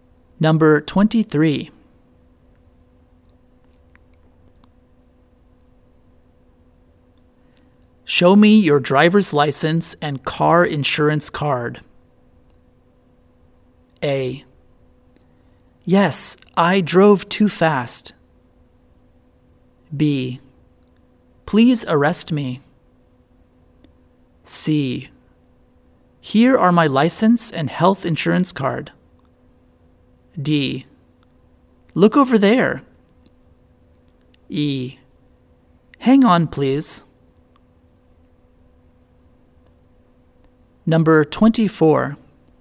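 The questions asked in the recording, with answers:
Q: Show me your driver's license and car insurance card.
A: E: Hang on, please.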